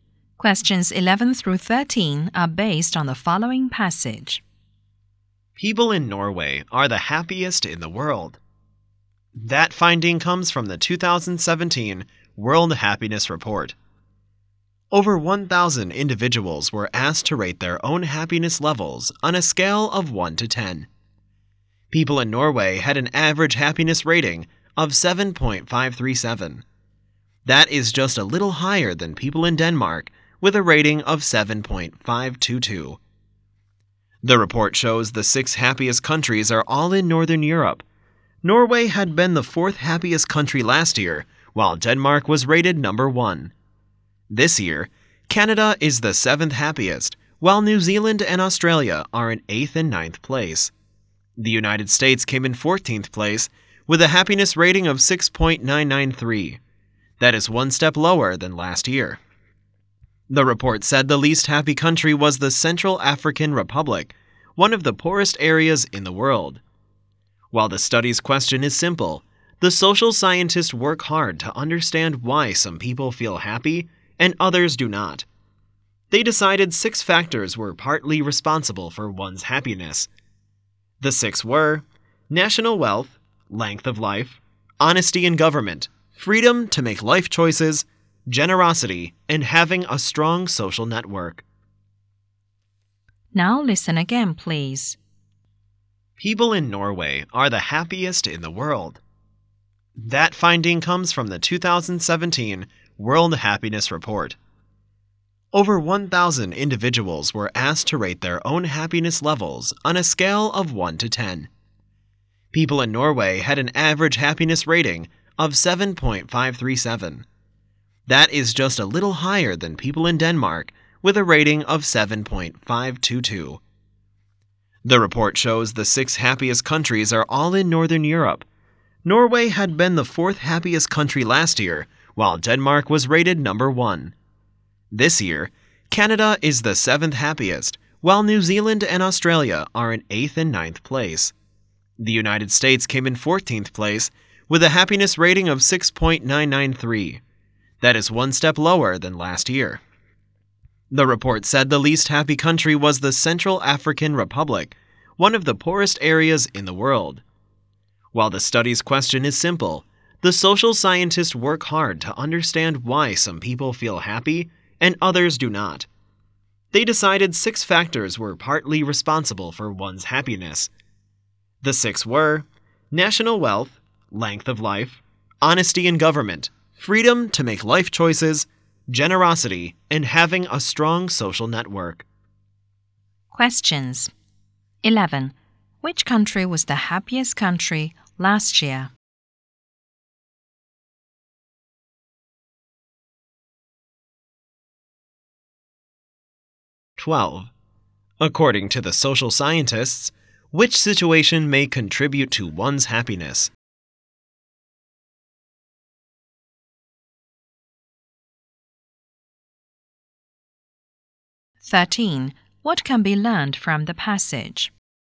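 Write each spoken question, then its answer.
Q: Which country was the happiest country last year?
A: Denmark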